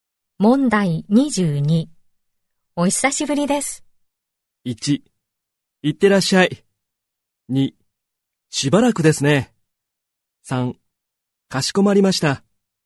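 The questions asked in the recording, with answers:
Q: お久しぶりです。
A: 2: しばらくですね。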